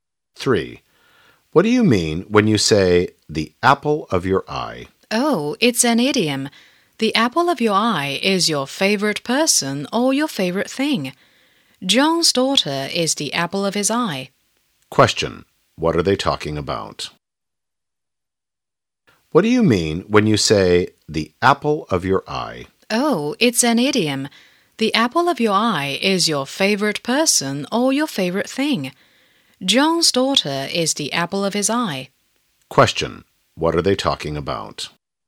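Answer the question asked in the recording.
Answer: An idiom (the apple of your eye)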